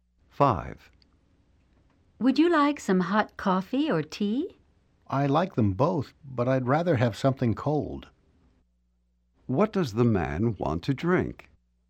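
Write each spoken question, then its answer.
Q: What does the man want to drink?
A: Something cold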